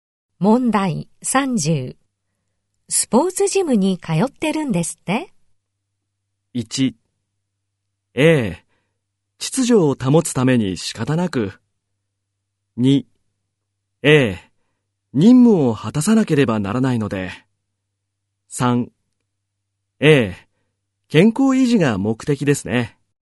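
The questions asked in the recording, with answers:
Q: スポーツジムに通ってるんですって?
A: 3: ええ、健康維持が目的ですね。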